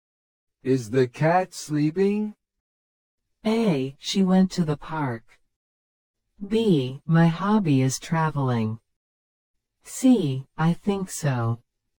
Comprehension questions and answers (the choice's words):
Select the best response to the question or statement and mark the letter (A), (B), or (C) on your answer sheet.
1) Is the cat sleeping?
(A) She went to the park.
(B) My hobby is traveling.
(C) I think so.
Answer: I think so.

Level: 初級者用